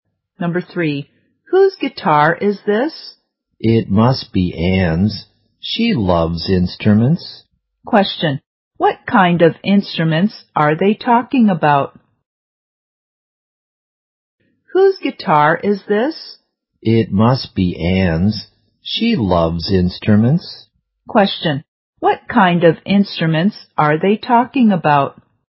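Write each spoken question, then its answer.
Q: Question, what kind of instruments are they talking about?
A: A guitar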